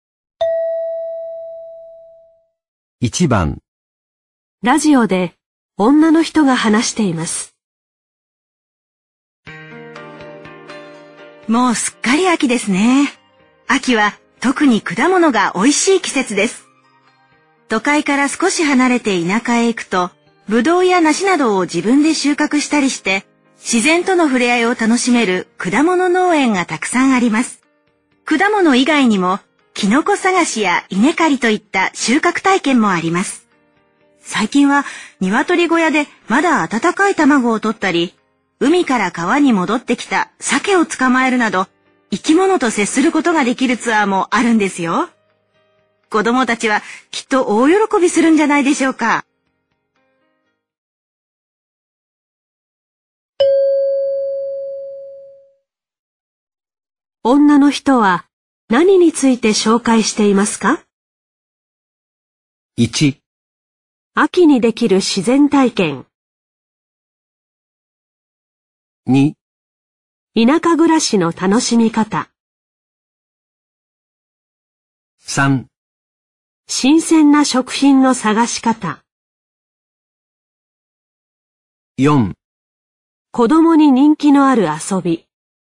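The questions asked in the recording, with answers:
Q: 女の人は何について紹介していますか?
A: 1: 秋にできる自然体験。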